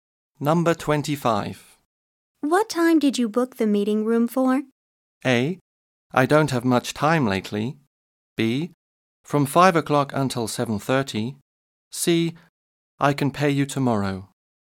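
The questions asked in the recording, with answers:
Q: What time did you book the meeting room for?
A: B: From 5 o'clock until 7:30.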